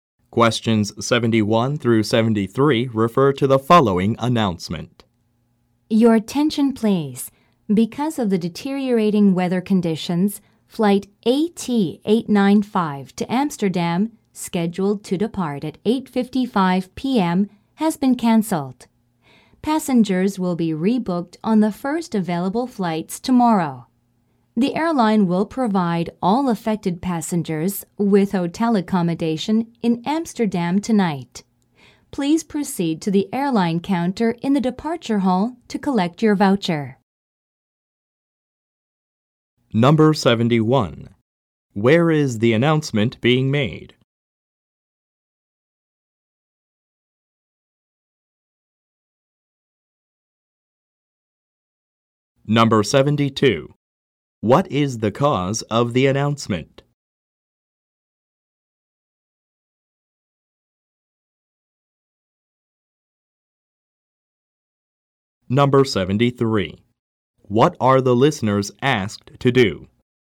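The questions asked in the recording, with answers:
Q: Where is the announcement being made?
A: At an airport

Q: What is the cause of the announcement?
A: Bad weather conditions causing a flight cancellation

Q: What are the listeners asked to do?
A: Go to the airline counter in the departure hall to collect a voucher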